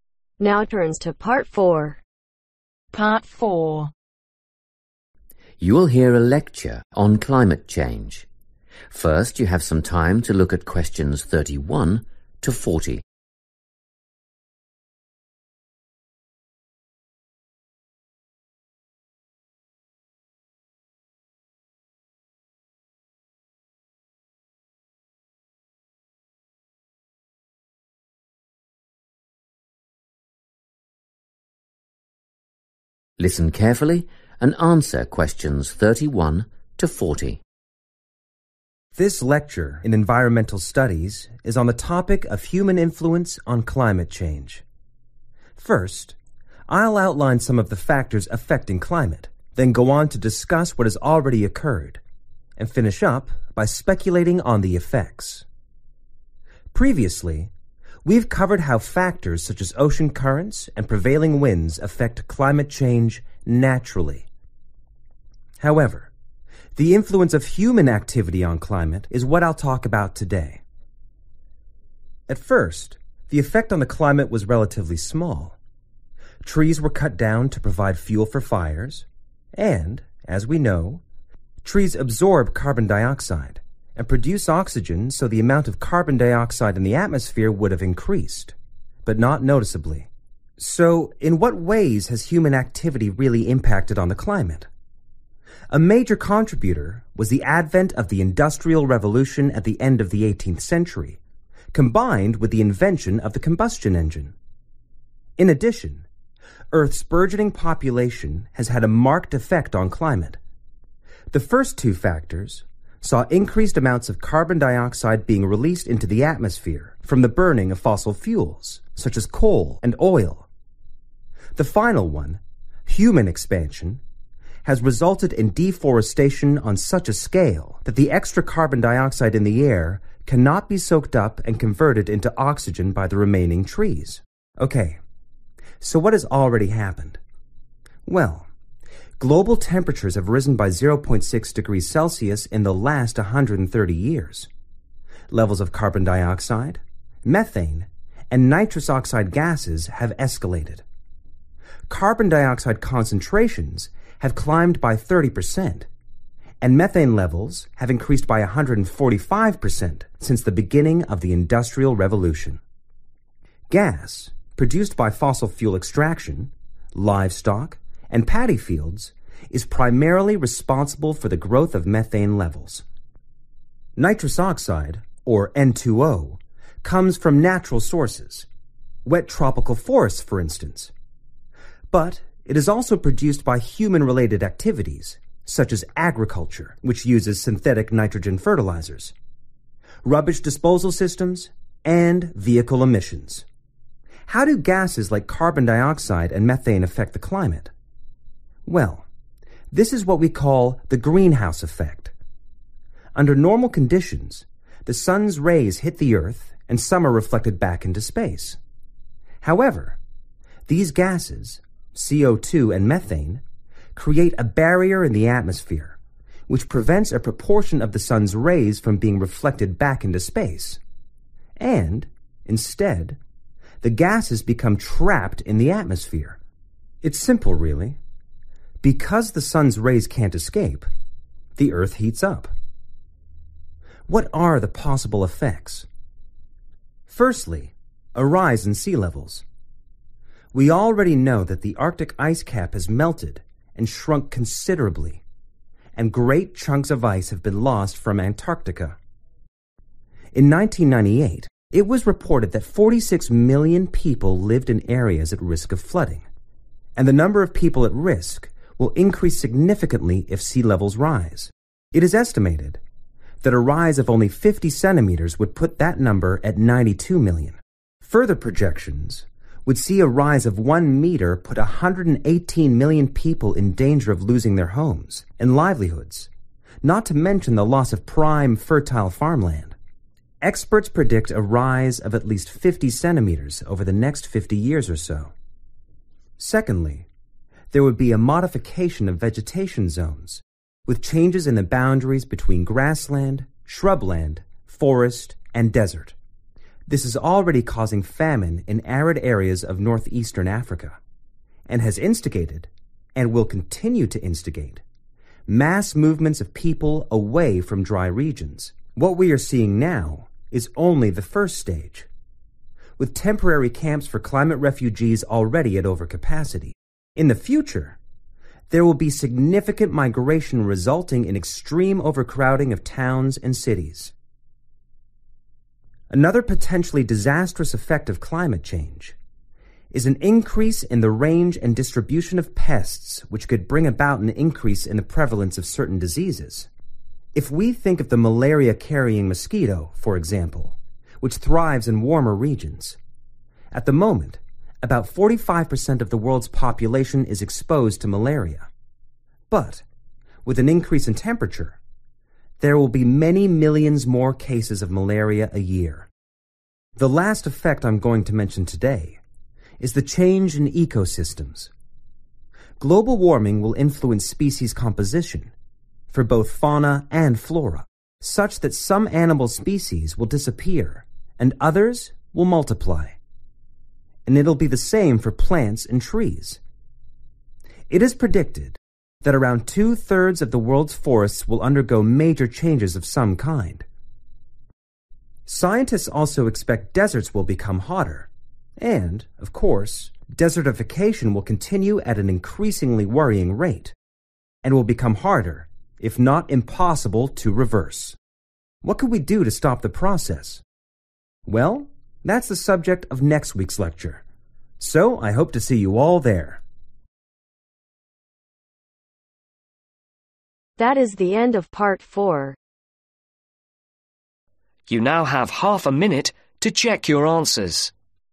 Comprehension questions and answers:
Complete the notes below. Write NO MORE THAN TWO WORDS AND/OR A NUMBER for each answer.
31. - Cutting down trees for (31)............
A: Fuel

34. N2O-(from (34).......... esp. fertilizer; waste management; car exhausts)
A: Agriculture

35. - Greenhouse Effect: gases from (35)............ -heat trapped-Earth warms up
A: (a) Barrier

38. (2) Change in (38)............ * more arid areas * population movement to cities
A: Vegetation zones

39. (3) Increase in pests and (39)............ e.g. malaria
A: (certain) Disease (s)

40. (4) Change in ecosystems: *shift in (40)............ -some die, others multiply* deserts get hotter & bigger.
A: Species Composition